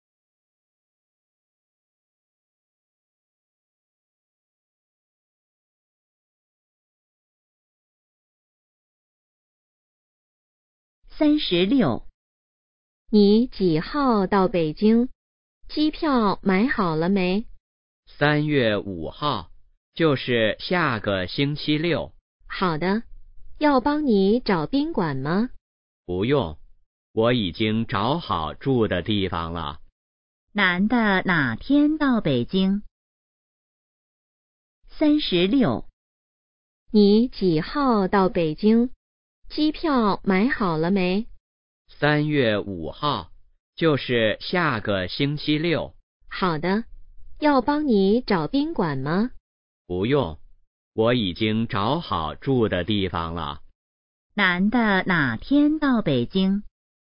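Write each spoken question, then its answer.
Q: 男的哪天到北京?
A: 3月5号(下个星期六)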